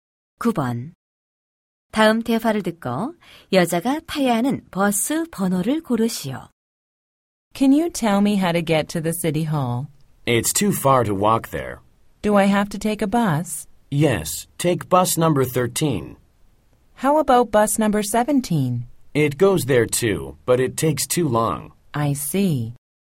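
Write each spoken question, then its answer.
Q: 다음 대화를 듣고 여자가 타야 하는 버스 번호를 고르시오.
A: 13번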